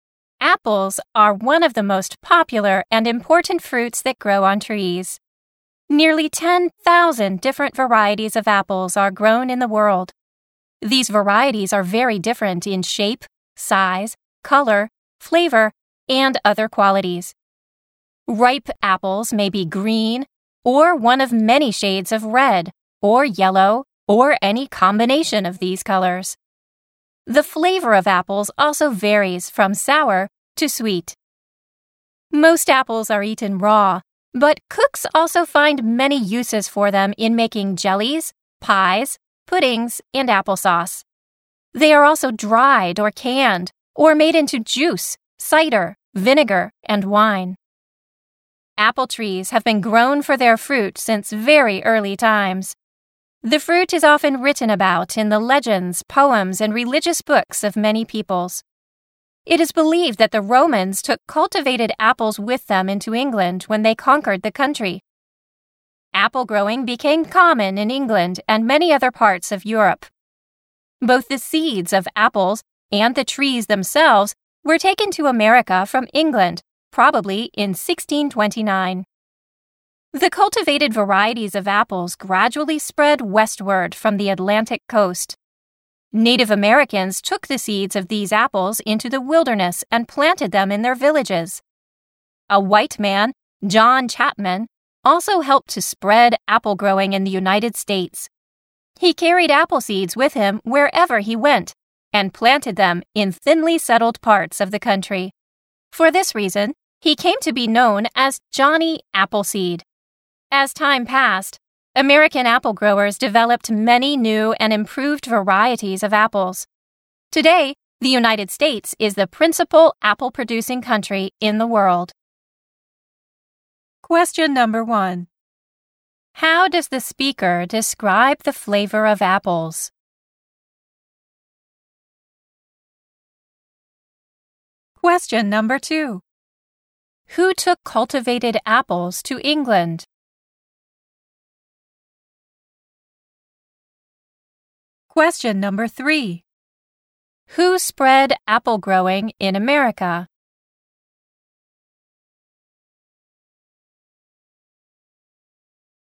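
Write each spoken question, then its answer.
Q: How does the speaker describe the flavor of apples?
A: It varies from sour to sweet.

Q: Who took cultivated apples to England?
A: The Romans.

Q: Who spread apple growing in America?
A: Native Americans and John Chapman (Johnny Appleseed).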